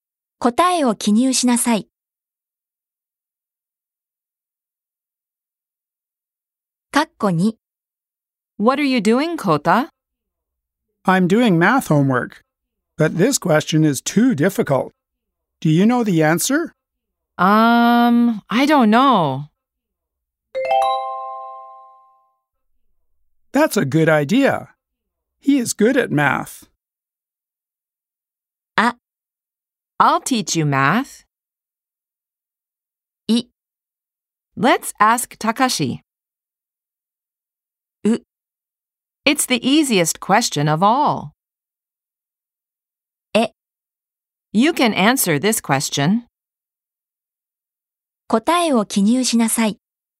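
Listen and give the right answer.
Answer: い: Let's ask Takashi.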